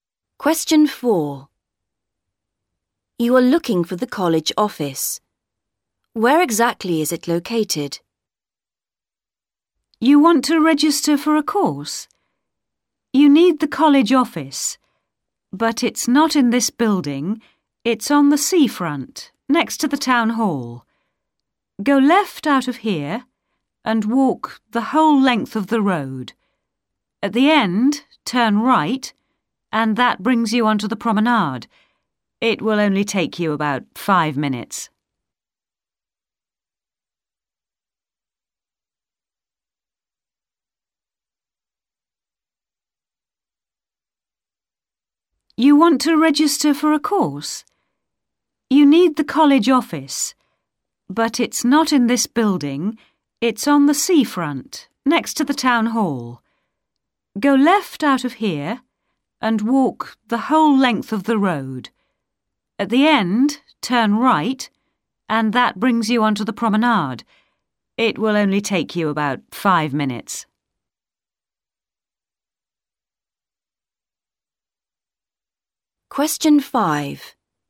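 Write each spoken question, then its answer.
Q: Where exactly is it located?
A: On the seafront, next to the town hall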